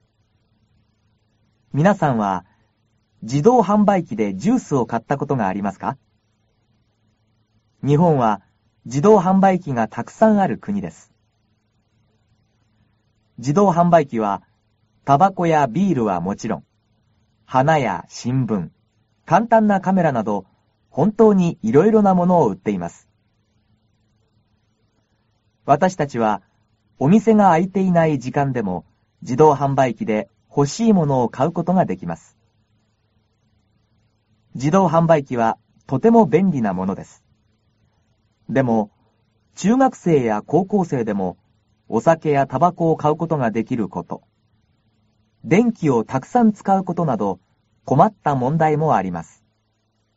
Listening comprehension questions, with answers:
ひらがなで書いてください。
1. 日本は.............................................です。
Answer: じどうはんばいきがたくさんあるくに